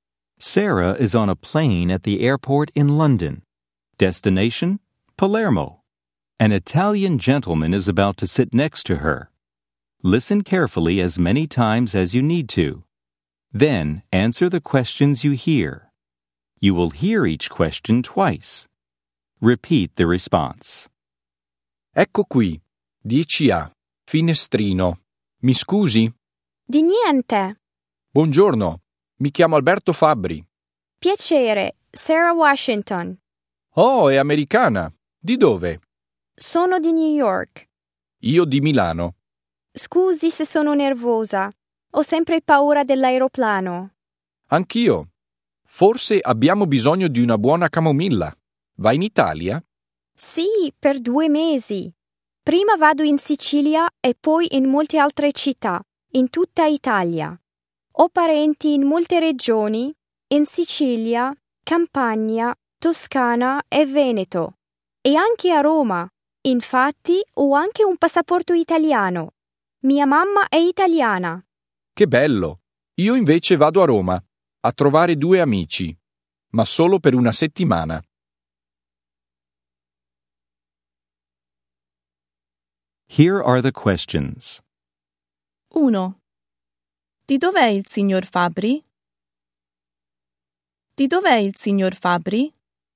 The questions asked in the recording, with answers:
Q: Di dov'è il signor Fabbri?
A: È di Milano.